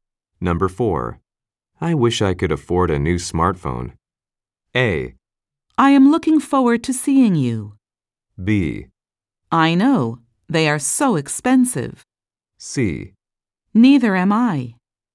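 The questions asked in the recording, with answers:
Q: I wish I could afford a new smartphone.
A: B: I know. They are so expensive.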